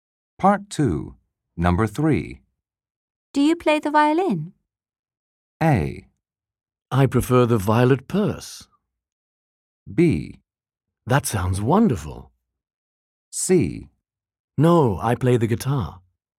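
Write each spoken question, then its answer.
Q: Do you play the violin?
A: C: No, I play the guitar.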